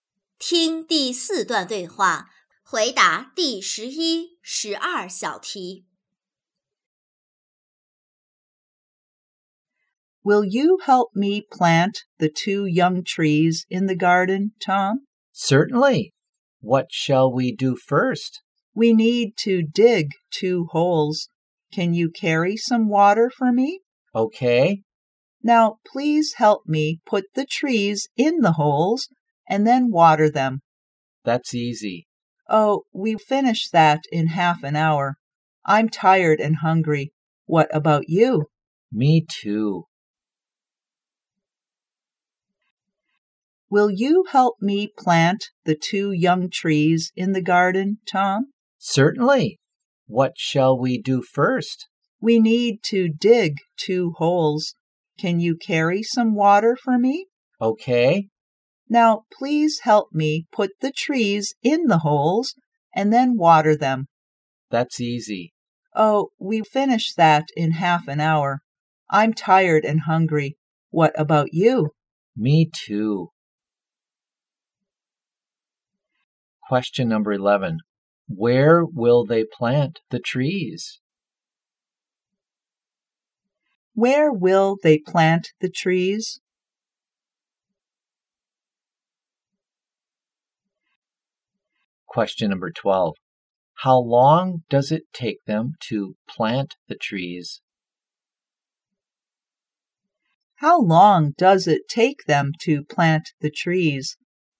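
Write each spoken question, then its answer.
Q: Where will they plant the trees?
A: In the garden

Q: How long does it take them to plant the trees?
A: Half an hour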